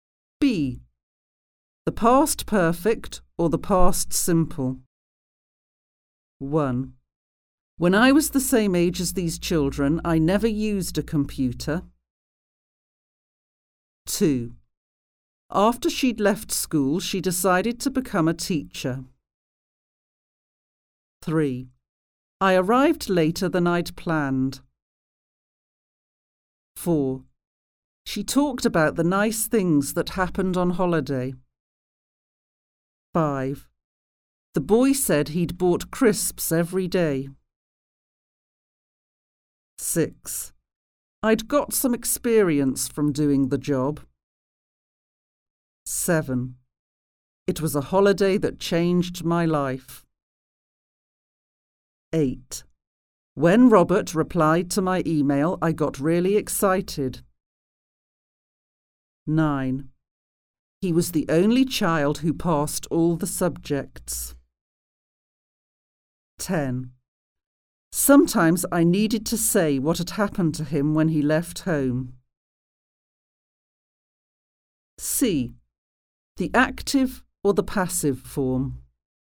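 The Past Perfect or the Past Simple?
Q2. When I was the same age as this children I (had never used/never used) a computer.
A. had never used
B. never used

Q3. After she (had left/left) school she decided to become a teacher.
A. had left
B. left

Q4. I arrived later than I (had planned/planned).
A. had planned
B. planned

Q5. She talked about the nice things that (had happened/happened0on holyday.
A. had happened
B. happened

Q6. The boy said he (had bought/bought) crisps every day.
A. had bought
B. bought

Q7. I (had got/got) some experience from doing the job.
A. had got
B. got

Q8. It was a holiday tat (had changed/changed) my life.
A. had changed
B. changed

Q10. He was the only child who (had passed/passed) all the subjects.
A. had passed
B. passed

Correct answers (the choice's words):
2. never used
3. had left
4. had planned
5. happened
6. had bought
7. had got
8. changed
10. passed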